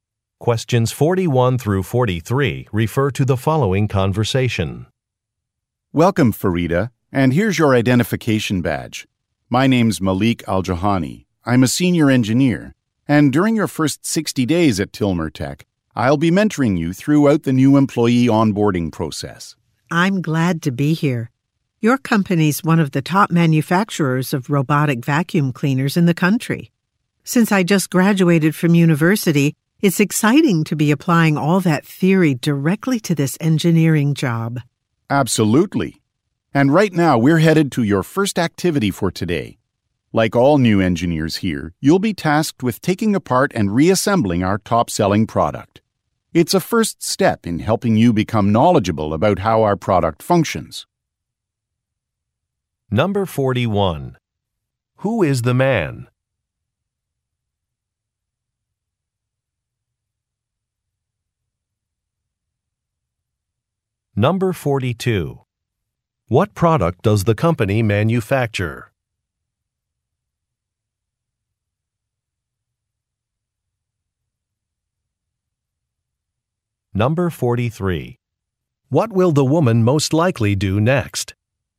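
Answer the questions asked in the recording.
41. A senior engineer
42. Robotic vacuum cleaners
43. Take apart and reassemble a product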